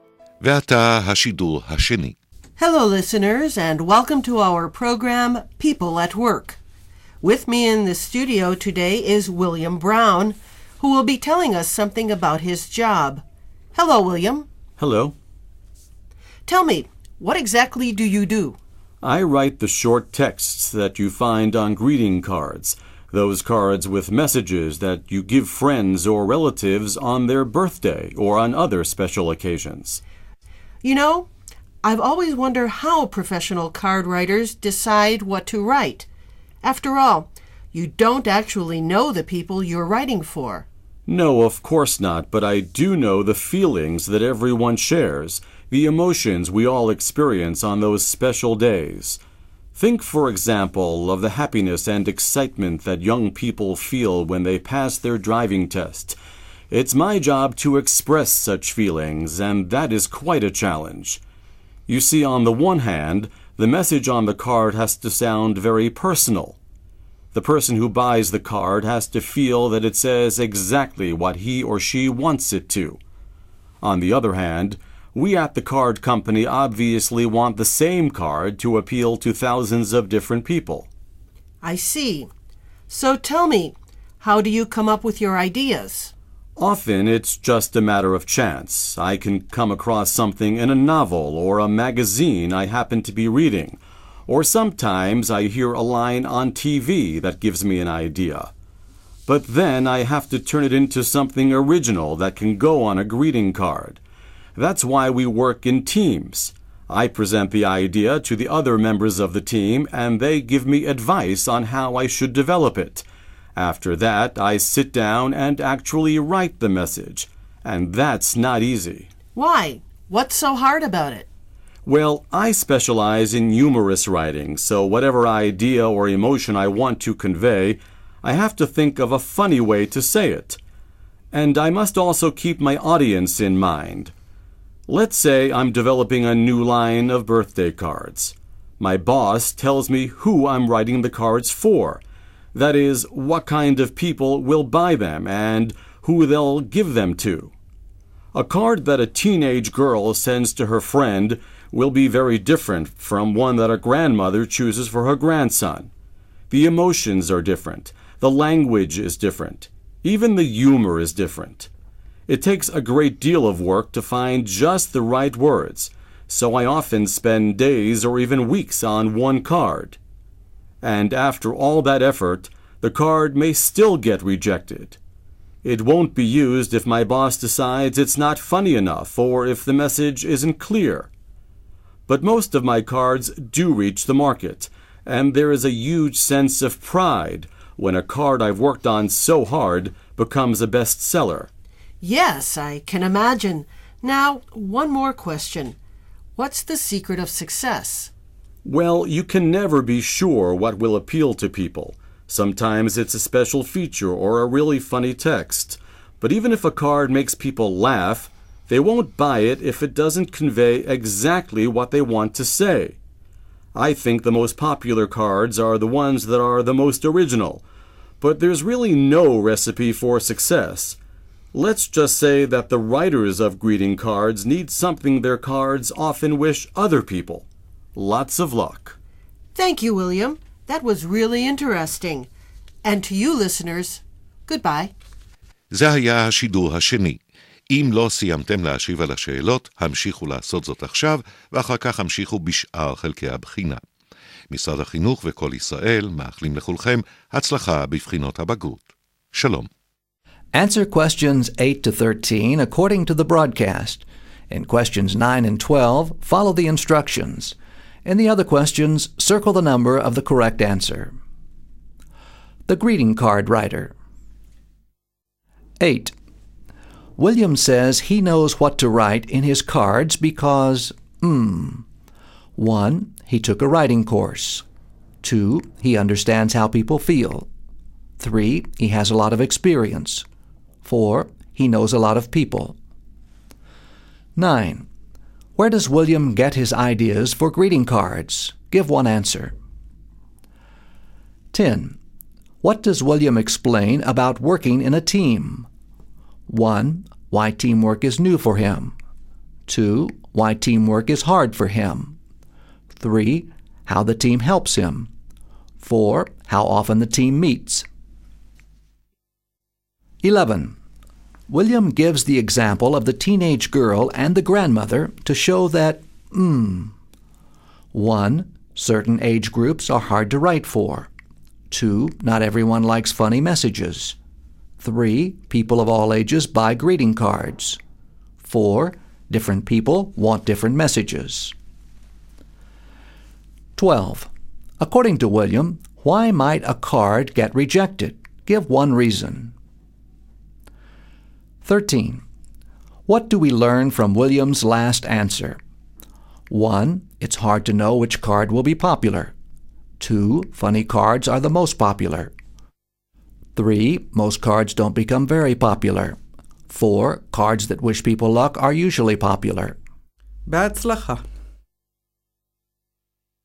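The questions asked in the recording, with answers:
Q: William says he knows what to write in his cards because 1.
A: 2: He understands how people feel.

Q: Where does William get his ideas for greeting cards?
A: From something he reads in a novel or magazine, or a line he hears on TV

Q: What does William explain about working in a team?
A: 3: How the team helps him.

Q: William gives the example of the teenage girl and the grandmother to show that 1.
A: 4: Different people want different messages.

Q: According to William, why might a card get rejected?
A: His boss decides it's not funny enough, or the message isn't clear

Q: What do we learn from William's last answer?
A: 1: It's hard to know which card will be popular.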